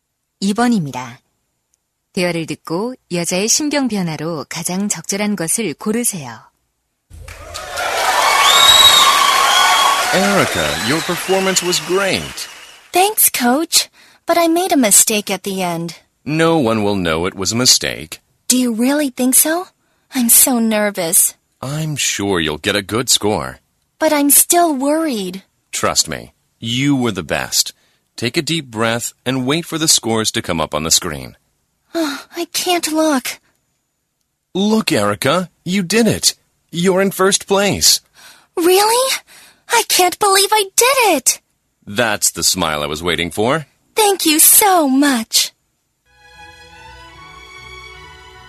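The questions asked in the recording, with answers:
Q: 대화를 듣고 여자의 심경 변화로 가장 적절한 것을 고르세요.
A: 불안함에서 기쁨으로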